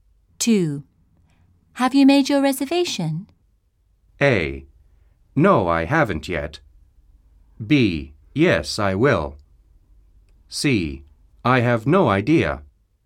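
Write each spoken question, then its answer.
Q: Have you made your reservation?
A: A: No, I haven't yet.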